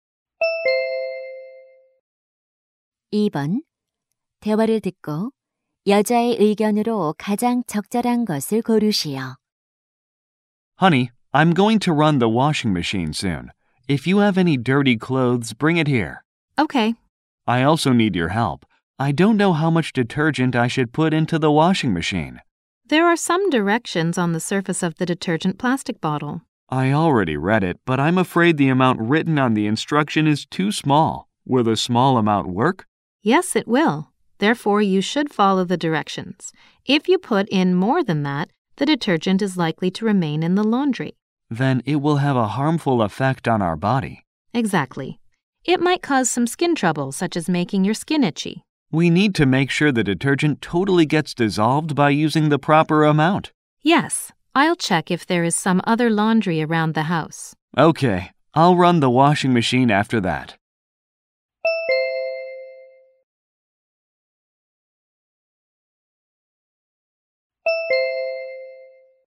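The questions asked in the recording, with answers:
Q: 대화를 듣고 여자의 의견으로 가장 적절한 것을 고르시오.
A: 세제는 설명서에 적힌 적정량을 사용해야 한다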